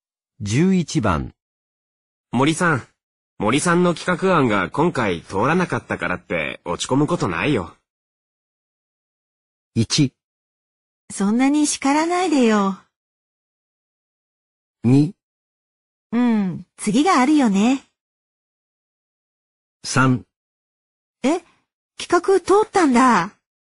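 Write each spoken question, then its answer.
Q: 森さん、森さんの企画案が今回通らなかったからって落ち込むことないよ。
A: 2: うん、次があるよね。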